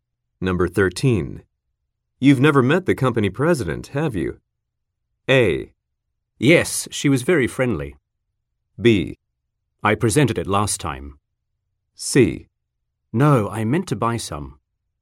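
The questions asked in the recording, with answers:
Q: You've never met the company president, have you?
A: A: Yes, she was very friendly.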